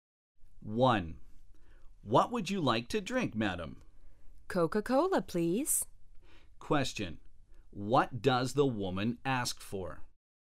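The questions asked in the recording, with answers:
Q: What does the woman ask for?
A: Coca-Cola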